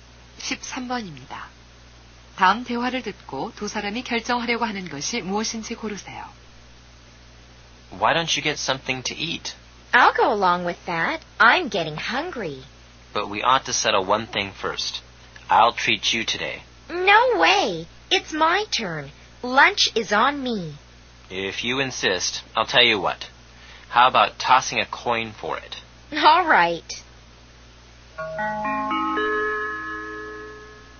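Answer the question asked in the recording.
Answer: 누가 점심값을 낼지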